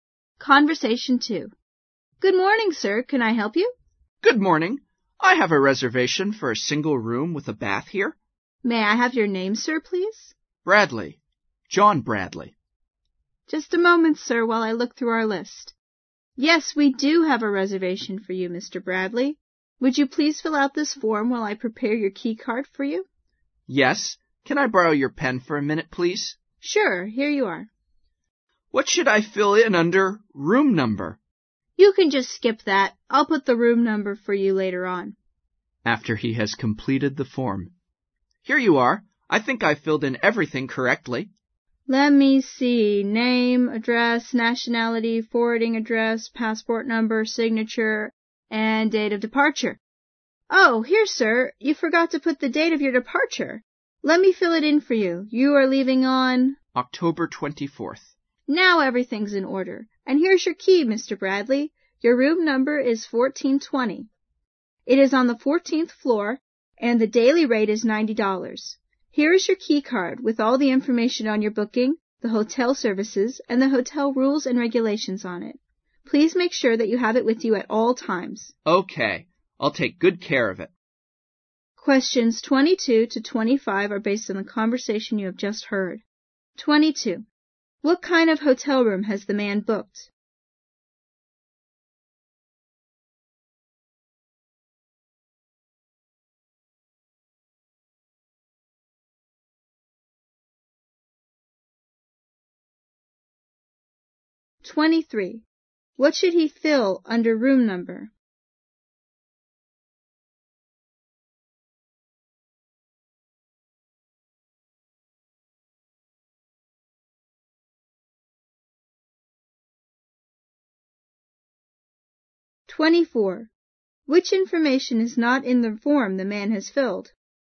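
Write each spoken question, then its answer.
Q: What kind of hotel room has the man booked?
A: A single room with a bath

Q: What should he fill under room number?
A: Nothing; he can skip it

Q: Which information is not in the form the man has filled?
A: The date of departure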